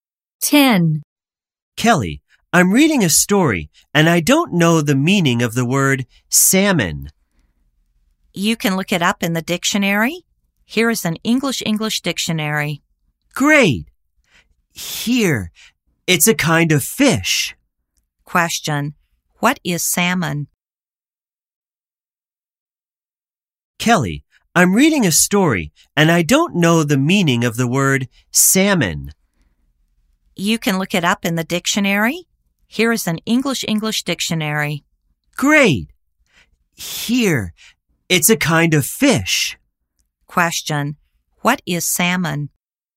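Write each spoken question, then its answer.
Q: what is salmon?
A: A kind of fish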